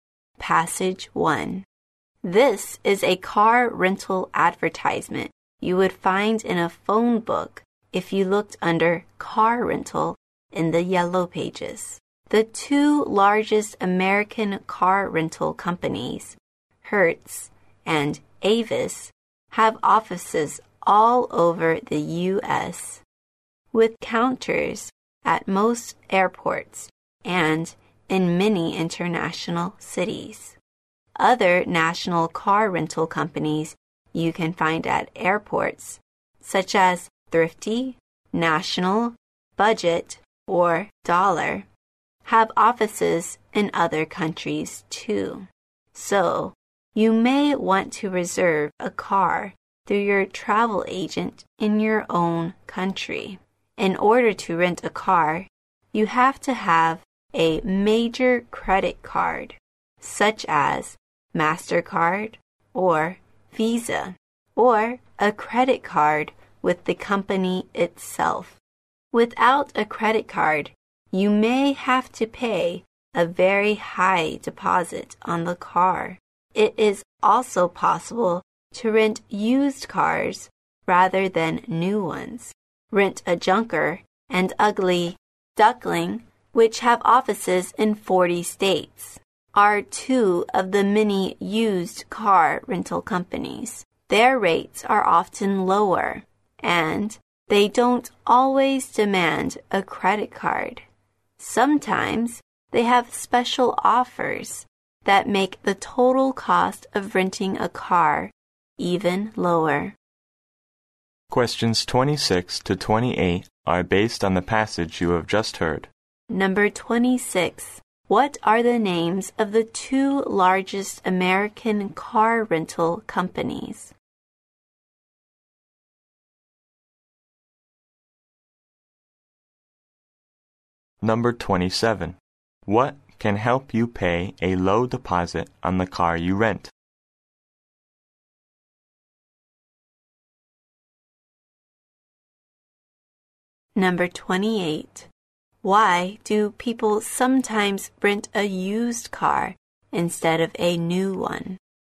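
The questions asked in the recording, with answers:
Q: What are the names of the two largest American car rental companies?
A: Hertz and Avis

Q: What can help you pay a low deposit on the car you rent?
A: A major credit card

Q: Why do people sometimes rent a used car instead of a new one?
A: Their rates are often lower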